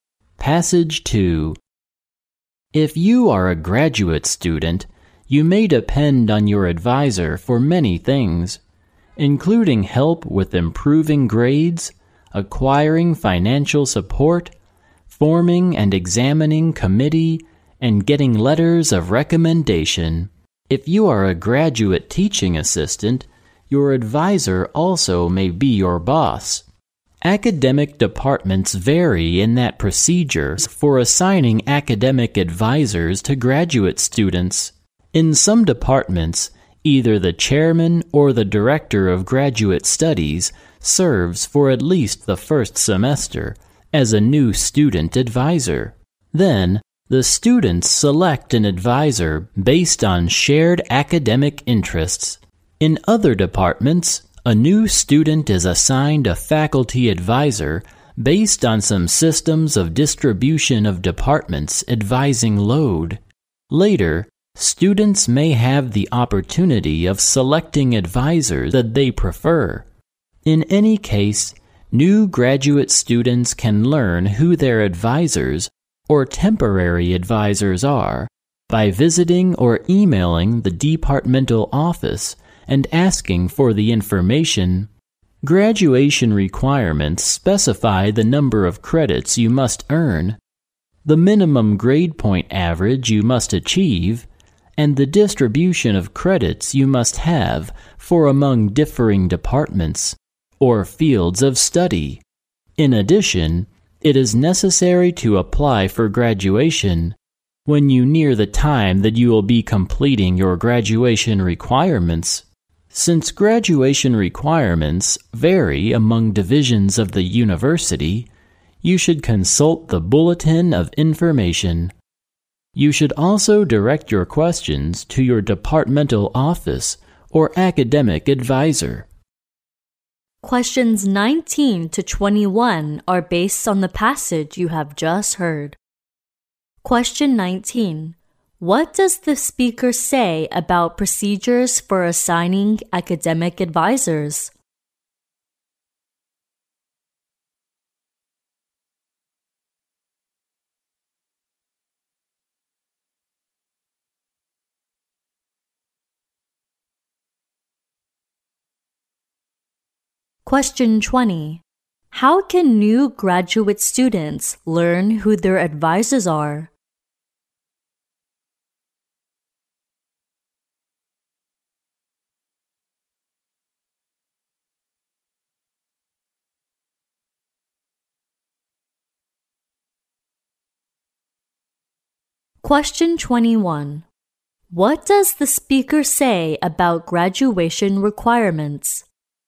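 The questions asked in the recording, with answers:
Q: What does the speaker say about procedures for assigning academic advisors?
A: They vary among departments

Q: How can new graduate students learn who their advisors are?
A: By visiting or emailing the departmental office

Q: What does the speaker say about graduation requirements?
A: They vary among divisions of the university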